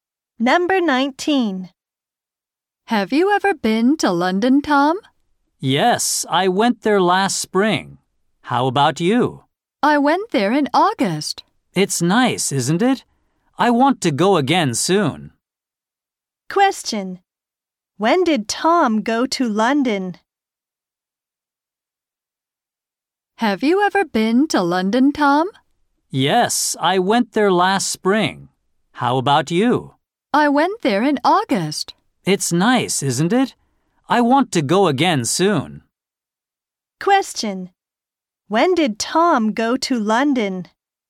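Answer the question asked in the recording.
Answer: Last spring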